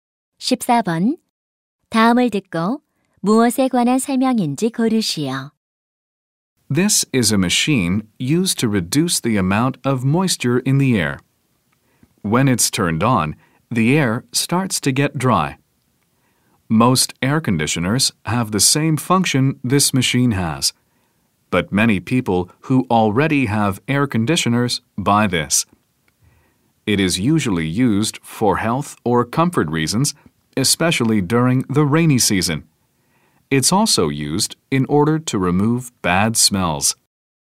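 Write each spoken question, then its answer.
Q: 다음을 듣고 무엇에 관한 설명인지 고르시오.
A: 제습기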